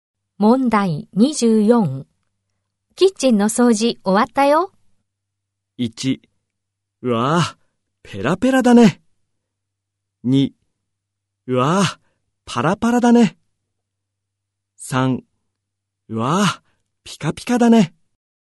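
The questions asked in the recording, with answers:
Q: キッチンの掃除終わったよ。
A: 3: うわぁ、ピカピカだね。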